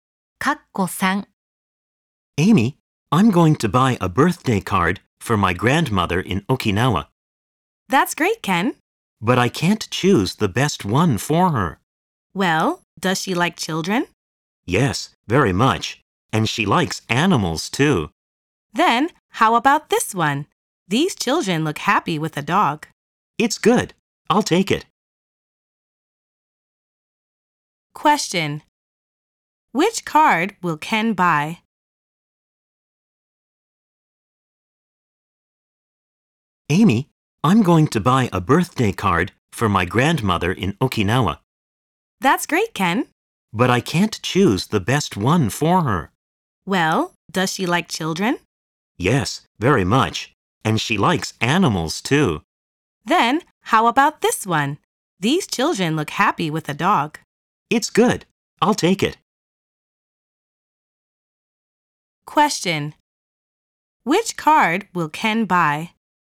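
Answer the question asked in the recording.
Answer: The card with happy children and a dog.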